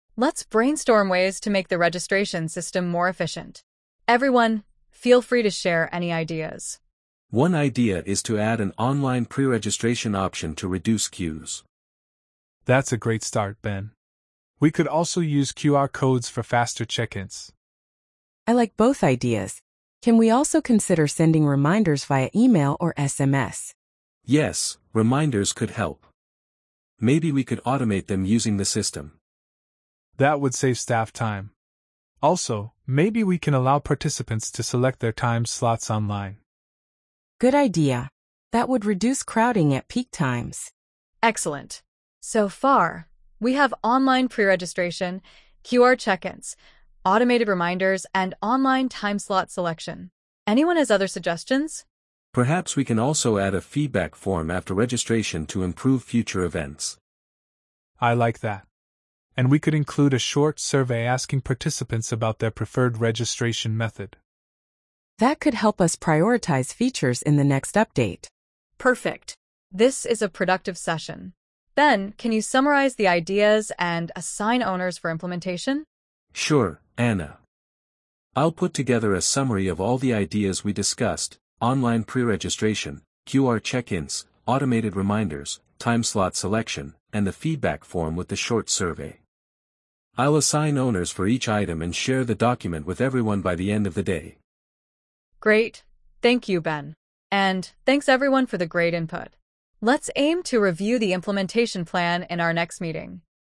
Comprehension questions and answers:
Complete the phrases as you listen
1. One idea is to add an online ______ option to reduce queues.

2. We could also use ______ codes for faster check-ins.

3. Can we also consider sending ______ via email or SMS?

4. Maybe we can allow participants to select their ______ online.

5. Perhaps we can also add a ______ form after registration to improve future events.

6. I'll assign ______ for each item and share the document with everyone by the end of the day.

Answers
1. pre-registration
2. QR
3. reminders
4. time slots
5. feedback
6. owners

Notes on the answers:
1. "One idea is to add an online pre-registration option to reduce queues."
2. "We could also use QR codes for faster check-ins."
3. "Can we also consider sending reminders via email or SMS?"
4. "Maybe we can allow participants to select their time slots online."
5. "Perhaps we can also add a feedback form after registration to improve future events."
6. "I'll assign owners for each item and share the document with everyone by the end of the day."

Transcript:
ANNA: Let's brainstorm ways to make the registration system more efficient. Everyone, feel free to share any ideas.
BEN: One idea is to add an online pre-registration option to reduce queues.
DAVID: That's a great start, Ben. We could also use QR codes for faster check-ins.
CLARA: I like both ideas. Can we also consider sending reminders via email or SMS?
BEN: Yes, reminders could help. Maybe we could automate them using the system.
DAVID: That would save staff time. Also, maybe we can allow participants to select their time slots online.
CLARA: Good idea! That would reduce crowding at peak times.
ANNA: Excellent. So far, we have online pre-registration, QR check-ins, automated reminders, and online time-slot selection. Anyone has other suggestions?
BEN: Perhaps we can also add a feedback form after registration to improve future events.
DAVID: I like that. And we could include a short survey asking participants about their preferred registration method.
CLARA: That could help us prioritize features in the next update.
ANNA: Perfect. This is a productive session. Ben, can you summarize the ideas and assign owners for implementation?
BEN: Sure, Anna. I'll put together a summary of all the ideas we discussed, online pre-registration, QR check-ins, automated reminders, time-slot selection, and the feedback form with the short survey. I'll assign owners for each item and share the document with everyone by the end of the day.
ANNA: Great, thank you, Ben. And thanks everyone for the great input. Let's aim to review the implementation plan in our next meeting.
Perfect!